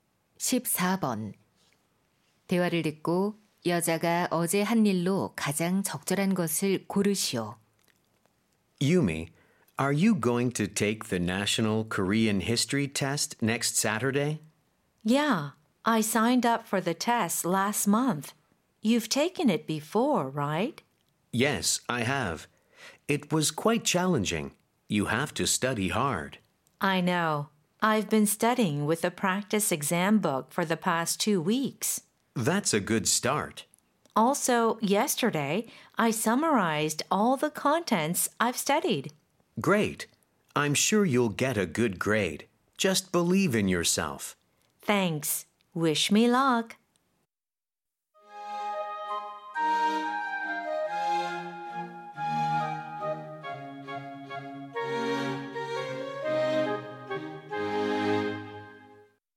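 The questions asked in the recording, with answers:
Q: 대화를 듣고 여자가 어제 한 일로 가장 적절한 것을 고르시오.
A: 공부한 내용 모두 요약하기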